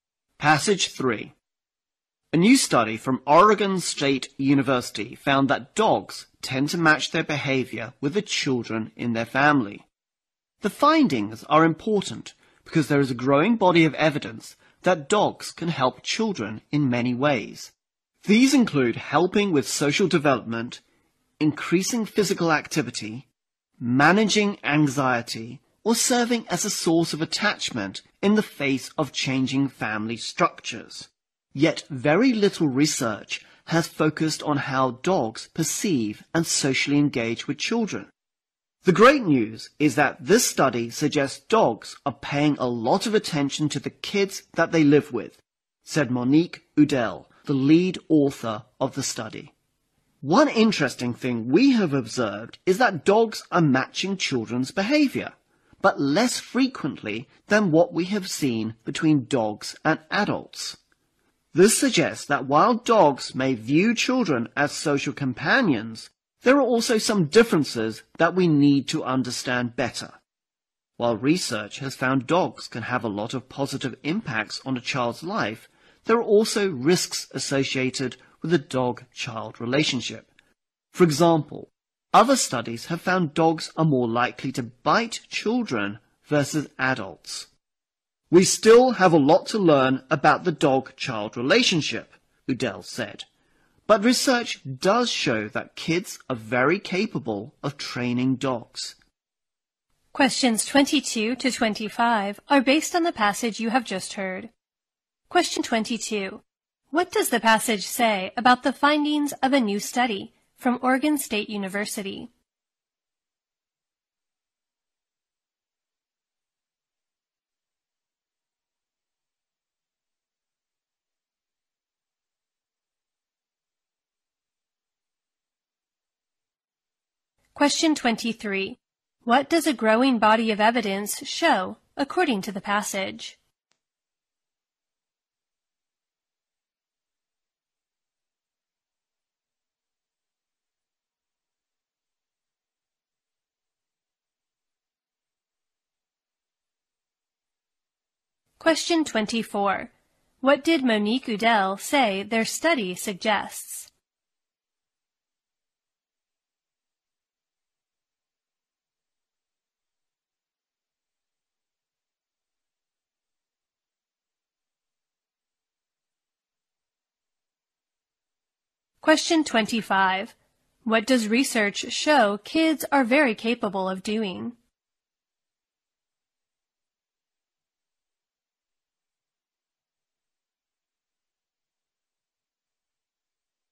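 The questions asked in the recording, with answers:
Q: What does the passage say about the findings of a new study from Oregon State University?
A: They are important, showing that dogs tend to match their behavior with the children in their family.

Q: What does a growing body of evidence show, according to the passage?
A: Dogs can help children in many ways.

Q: What did Monique Udell say their study suggests?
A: Dogs pay a lot of attention to the kids they live with.

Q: What does research show kids are very capable of doing?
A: Training dogs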